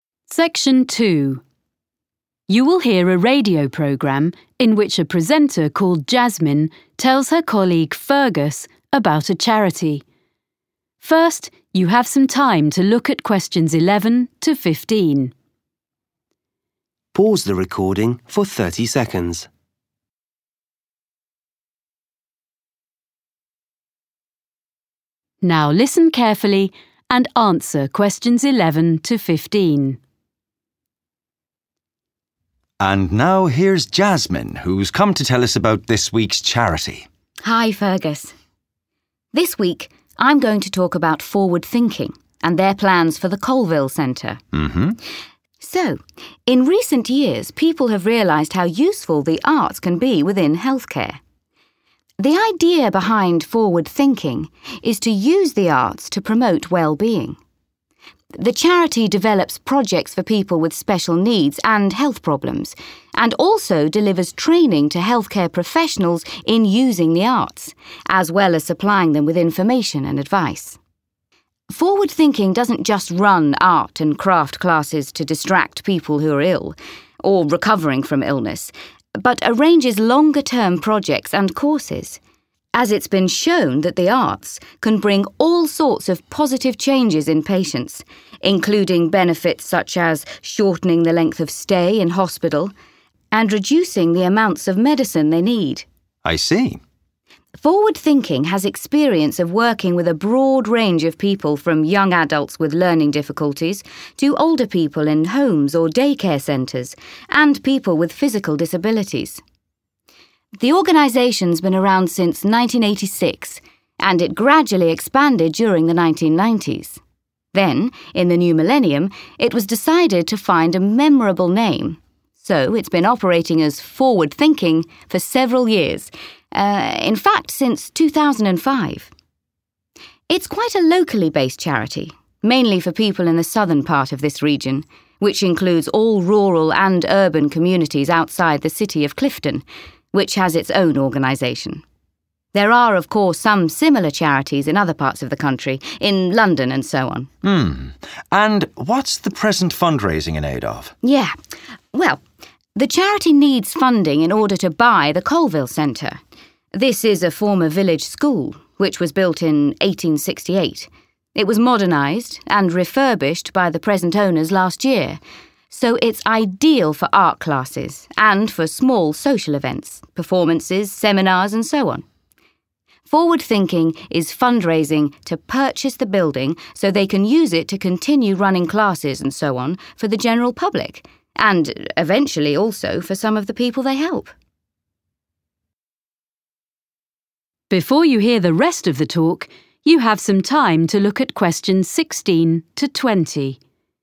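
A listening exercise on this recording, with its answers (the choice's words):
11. What does the charity Forward thinking do?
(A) It funds art exhibitions in hospitals.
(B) It produces affordable materials for art therapy.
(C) It encourages the use of arts projects in healthcare.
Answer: It encourages the use of arts projects in healthcare.

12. What benefit of Forward thinking's work does Jasmine mention?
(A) People avoid going to hospital.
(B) Patients require fewer drugs.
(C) Medical students do better in tests.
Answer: Patients require fewer drugs.

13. When did the organisation become known as Forward thinking?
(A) 1986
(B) in the 1990s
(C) 2005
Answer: 2005

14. Where does Forward thinking operate?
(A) within Clifton city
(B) in all parts of London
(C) in several towns and villages near Clifton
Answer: in several towns and villages near Clifton

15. Jasmine explains that the Colville Centre is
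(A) a school for people with health problems.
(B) a venue for a range of different activities.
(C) a building which needs repairing.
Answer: a venue for a range of different activities.

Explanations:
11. Jasmine: The idea behind Forward thinking is to use the arts to promote wellbeing. The charity develops projects for people with special needs and health problems. and also delivers training to healthcare professionals in using the arts, as well as supplying them with information and advice. (Ý tưởng đằng sau Forward-Thinking là sử dụng nghệ thuật để thúc đẩy chất lượng cuộc sống. Tổ chức từ thiện phát triển các dự án cho những người có nhu cầu đặc biệt và các vấn đề về sức khỏe. và cũng cung cấp khóa đào tạo cho các chuyên gia chăm sóc sức khỏe trong việc sử dụng nghệ thuật, cũng như cung cấp cho họ thông tin và lời khuyên.)
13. Jasmine: The organization's been around since 1986, and it gradually expanded during the 1990s. 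Then, in the new millennium, it was decided to find a memorable name, so it's been operating as Forward thinking for several years, er, in fact since 2005. (Sau đó, trong thiên niên kỷ mới, nó đã quyết định tìm một cái tên dễ nhớ, vì vậy nó đã hoạt động với cái tên Forward-thinking trong vài năm, thực tế là từ năm 2005.)
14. Jasmine: It's quite a locally based charity, mainly for people in the southern part of this region, which includes all rural and urban communities outside the city of Clifton, which has its own organization. (Đó là một tổ chức từ thiện có trụ sở tại địa phương, chủ yếu dành cho những người ở phía nam của khu vực này, bao gồm tất cả các cộng đồng nông thôn và thành thị bên ngoài thành phố Clifton, có tổ chức riêng.)
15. It was modernized and refurbished by the present owners last year, so it's ideal for art classes and for small social events, performances, seminars and so on.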